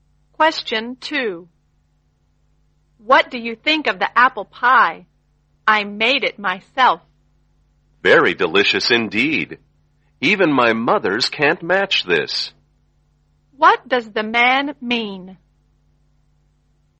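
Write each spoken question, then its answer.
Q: What does the man mean?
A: The apple pie is very delicious, even better than his mother's.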